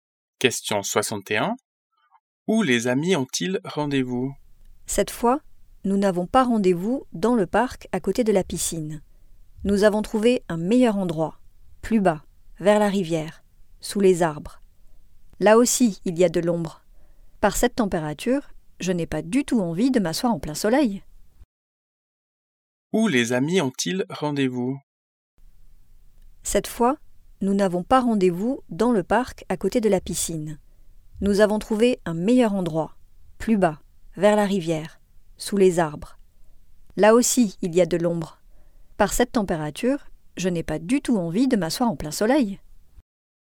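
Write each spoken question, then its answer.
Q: Où les amis ont-ils rendez-vous?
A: Vers la rivière, sous les arbres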